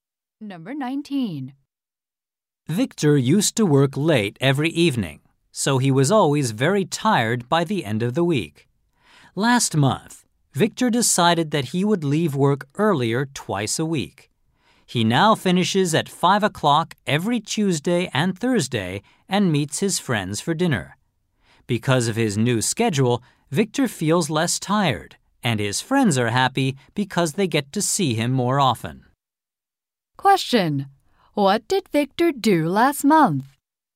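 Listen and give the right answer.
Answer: He decided to leave work earlier twice a week.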